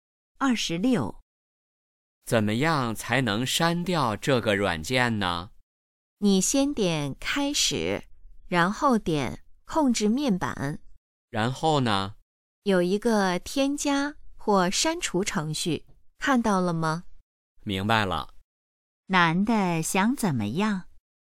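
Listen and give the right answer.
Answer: 删掉一个软件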